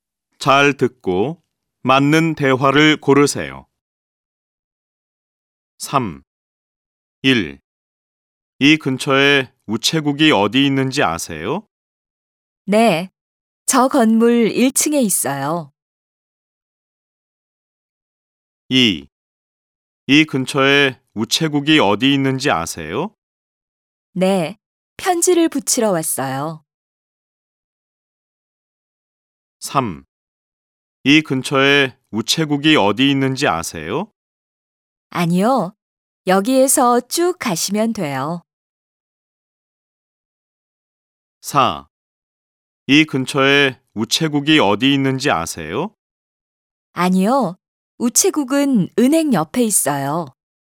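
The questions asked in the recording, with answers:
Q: 이 근처에 우체국이 어디 있는지 아세요?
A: 1: 네. 저 건물 1층에 있어요.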